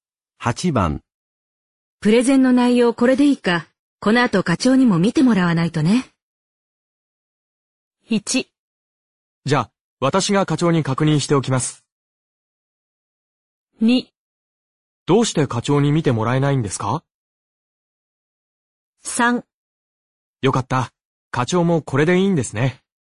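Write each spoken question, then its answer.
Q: プレゼンの内容これでいいか、この後課長にも見てもらわないとね。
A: 1: じゃあ、私が課長に確認しておきます。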